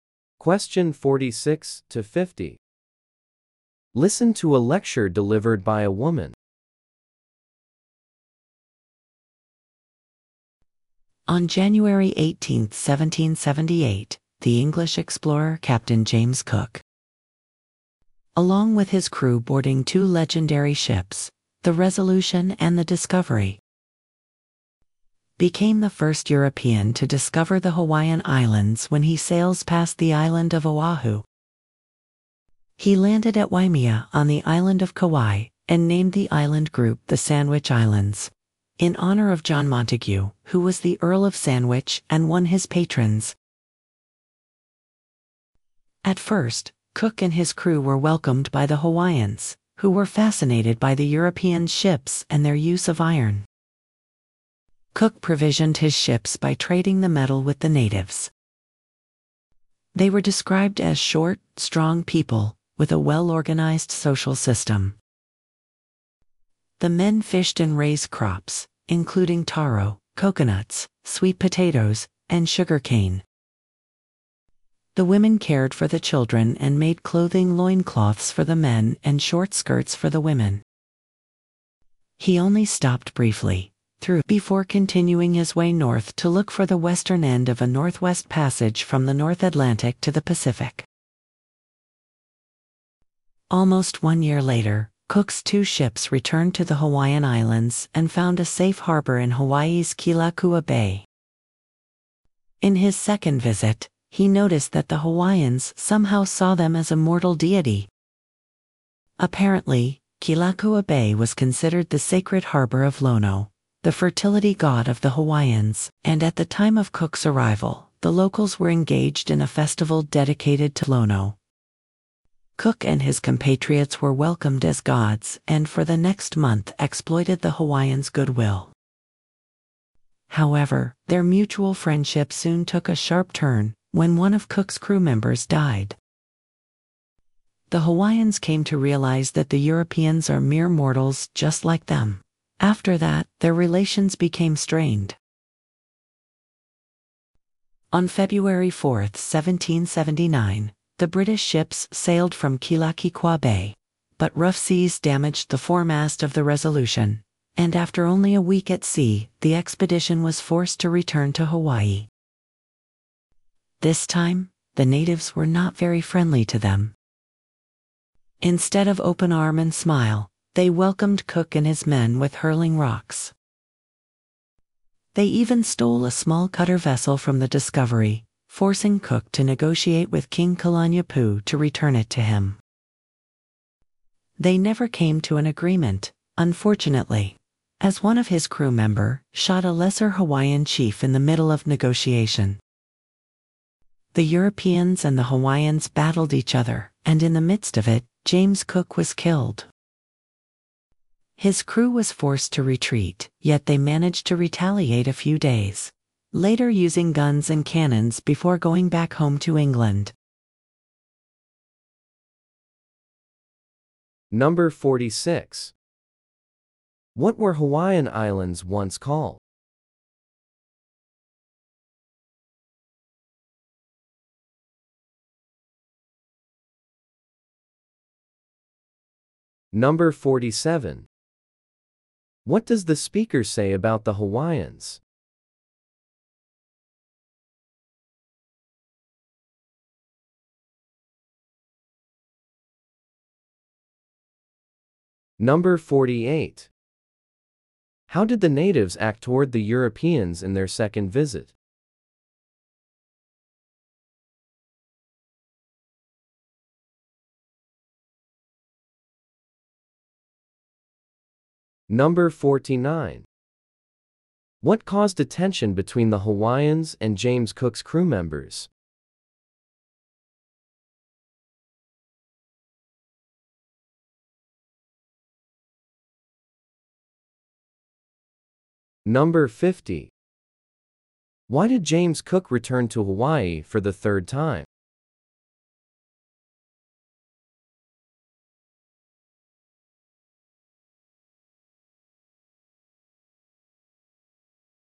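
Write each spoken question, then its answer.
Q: What were Hawaiian Islands once called?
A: The Sandwich Islands.

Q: How did the natives act toward the Europeans in their second visit?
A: They welcomed them as gods.

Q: What caused a tension between the Hawaiians and James Cook's crew members?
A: The death of one of Cook's crew members, which showed the Hawaiians that the Europeans were mortal.

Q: Why did James Cook return to Hawaii for the third time?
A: Rough seas damaged the Resolution's foremast.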